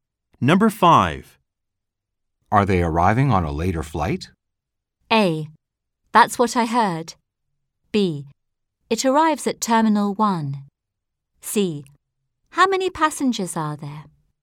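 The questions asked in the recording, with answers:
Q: Are they arriving on a later flight?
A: A: That's what I heard.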